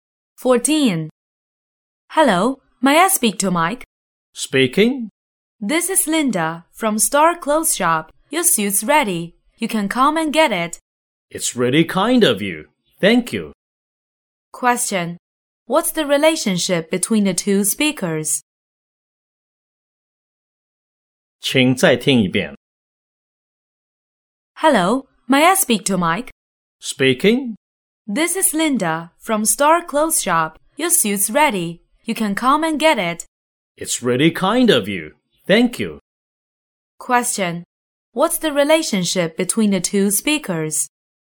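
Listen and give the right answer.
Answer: Shop assistant and customer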